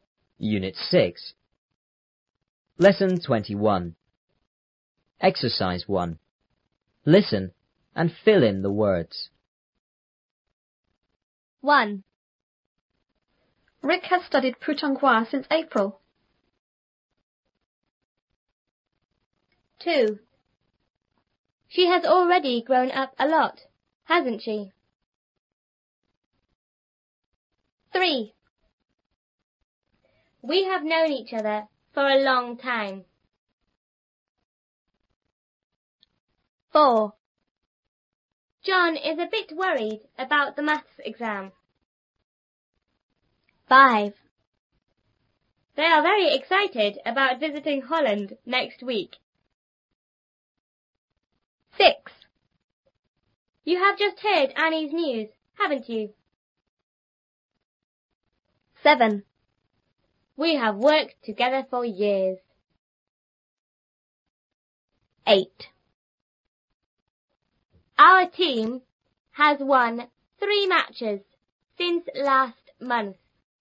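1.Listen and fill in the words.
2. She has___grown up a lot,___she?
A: already; hasn't

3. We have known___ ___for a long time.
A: each other

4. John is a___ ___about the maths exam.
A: bit worried

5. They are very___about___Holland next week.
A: excited; visiting

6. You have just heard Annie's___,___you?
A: news; haven't

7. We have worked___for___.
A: together; years

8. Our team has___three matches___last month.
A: won; since

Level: 初中英语广州版3B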